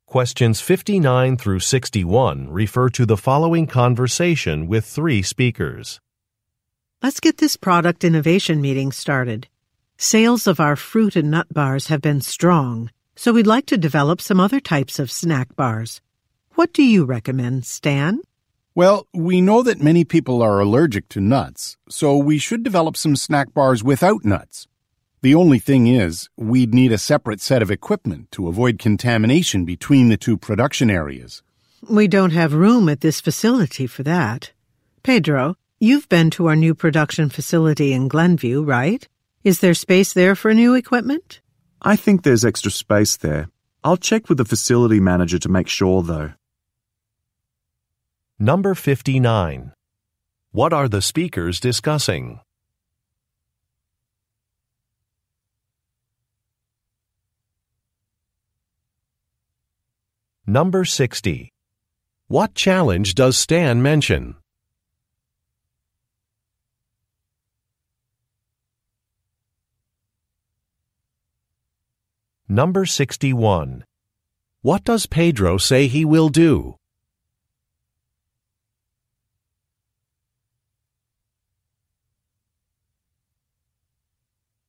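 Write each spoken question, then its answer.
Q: What are the speakers discussing?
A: Developing new types of snack bars

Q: What challenge does Stan mention?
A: They would need separate equipment to avoid contamination, and there is no room at the current facility

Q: What does Pedro say he will do?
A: Check with the facility manager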